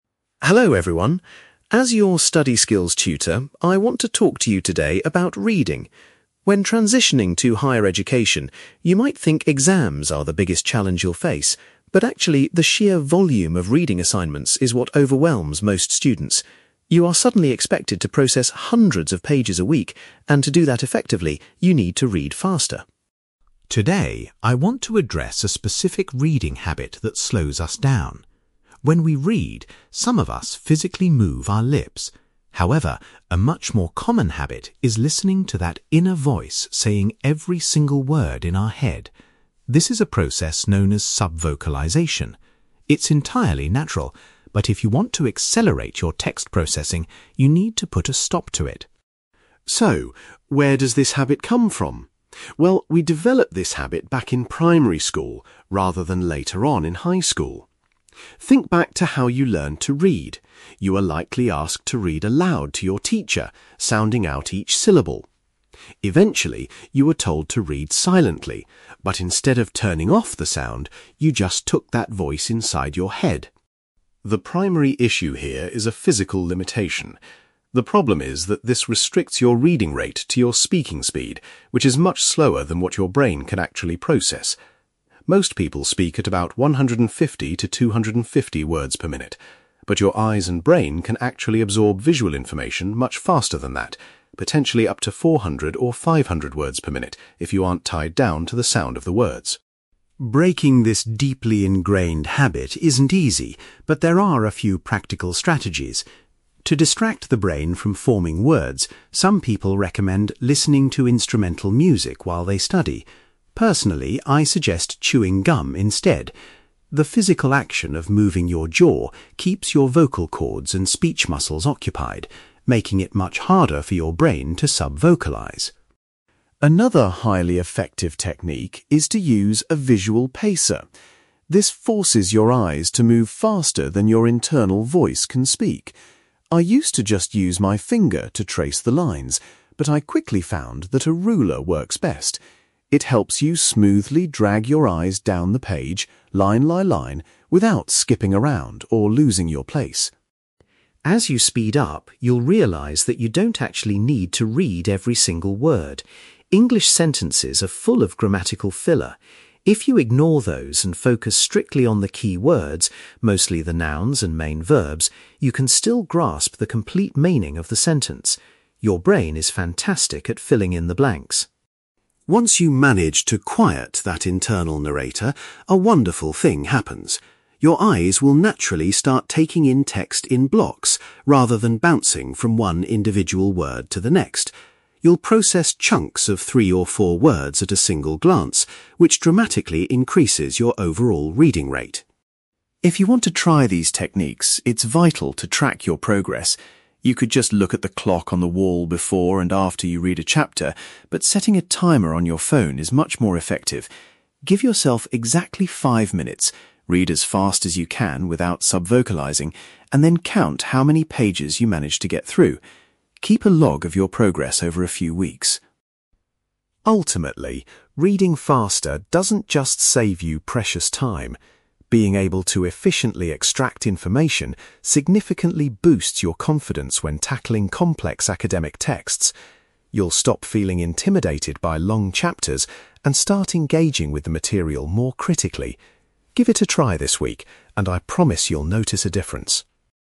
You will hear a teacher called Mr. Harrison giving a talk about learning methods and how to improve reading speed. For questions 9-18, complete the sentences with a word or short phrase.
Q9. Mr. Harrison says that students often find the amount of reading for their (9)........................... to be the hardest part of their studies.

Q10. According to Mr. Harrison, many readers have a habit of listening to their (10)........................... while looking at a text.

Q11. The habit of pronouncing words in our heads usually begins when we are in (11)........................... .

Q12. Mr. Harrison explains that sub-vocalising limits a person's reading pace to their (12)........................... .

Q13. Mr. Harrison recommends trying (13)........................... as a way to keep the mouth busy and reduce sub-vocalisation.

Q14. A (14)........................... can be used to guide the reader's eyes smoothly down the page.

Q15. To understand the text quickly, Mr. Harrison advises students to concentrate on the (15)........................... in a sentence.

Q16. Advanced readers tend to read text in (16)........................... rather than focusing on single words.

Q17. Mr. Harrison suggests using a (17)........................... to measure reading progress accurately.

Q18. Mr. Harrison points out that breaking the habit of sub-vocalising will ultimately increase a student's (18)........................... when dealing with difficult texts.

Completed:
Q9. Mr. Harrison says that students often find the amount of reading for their assignments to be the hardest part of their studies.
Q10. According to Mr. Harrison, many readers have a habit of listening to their inner voice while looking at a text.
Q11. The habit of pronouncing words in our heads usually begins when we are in primary school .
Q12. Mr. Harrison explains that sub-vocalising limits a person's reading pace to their speaking speed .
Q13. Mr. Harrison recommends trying chewing gum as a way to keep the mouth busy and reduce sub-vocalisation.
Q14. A ruler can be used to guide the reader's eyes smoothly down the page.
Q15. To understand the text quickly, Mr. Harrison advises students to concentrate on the key words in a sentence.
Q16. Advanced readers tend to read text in blocks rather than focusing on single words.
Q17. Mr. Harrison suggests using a timer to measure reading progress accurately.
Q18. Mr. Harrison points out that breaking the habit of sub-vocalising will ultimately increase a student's confidence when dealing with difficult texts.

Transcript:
Harrison: Hello everyone. As your study skills tutor, I want to talk to you today about reading. When transitioning to higher education, you might think exams are the biggest challenge you'll face. But actually, the sheer volume of reading assignments is what overwhelms most students. You are suddenly expected to process hundreds of pages a week, and to do that effectively, you need to read faster.
Today, I want to address a specific reading habit that slows us down. When we read, some of us physically move our lips. However, a much more common habit is listening to that inner voice saying every single word in our head. This is a process known as sub-vocalisation. It's entirely natural, but if you want to accelerate your text processing, you need to put a stop to it.
So, where does this habit come from? Well, we developed this habit back in primary school, rather than later on in high school. Think back to how you learned to read: you were likely asked to read aloud to your teacher, sounding out each syllable. Eventually, you were told to read silently, but instead of turning off the sound, you just took that voice inside your head.
The primary issue here is a physical limitation. The problem is that this restricts your reading rate to your speaking speed, which is much slower than what your brain can actually process. Most people speak at about 150 to 250 words per minute. But your eyes and brain can actually absorb visual information much faster than that—potentially up to 400 or 500 words per minute if you aren't tied down to the sound of the words.
Breaking this deeply ingrained habit isn't easy, but there are a few practical strategies. To distract the brain from forming words, some people recommend listening to instrumental music while they study. Personally, I suggest chewing gum instead. The physical action of moving your jaw keeps your vocal cords and speech muscles occupied, making it much harder for your brain to sub-vocalise.
Another highly effective technique is to use a visual pacer. This forces your eyes to move faster than your internal voice can speak. I used to just use my finger to trace the lines, but I quickly found that a ruler works best. It helps you smoothly drag your eyes down the page, line by line, without skipping around or losing your place.
As you speed up, you'll realise that you don't actually need to read every single word. English sentences are full of grammatical filler. If you ignore those and focus strictly on the key words—mostly the nouns and main verbs—you can still grasp the complete meaning of the sentence. Your brain is fantastic at filling in the blanks.
Once you manage to quiet that internal narrator, a wonderful thing happens. Your eyes will naturally start taking in text in blocks, rather than bouncing from one individual word to the next. You'll process chunks of three or four words at a single glance, which dramatically increases your overall reading rate.
If you want to try these techniques, it's vital to track your progress. You could just look at the clock on the wall before and after you read a chapter, but setting a timer on your phone is much more effective. Give yourself exactly five minutes, read as fast as you can without sub-vocalising, and then count how many pages you managed to get through. Keep a log of your progress over a few weeks.
Ultimately, reading faster doesn't just save you precious time. Being able to efficiently extract information significantly boosts your confidence when tackling complex academic texts. You'll stop feeling intimidated by long chapters and start engaging with the material more critically. Give it a try this week, and I promise you'll notice a difference.

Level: B2 English Listening Exercise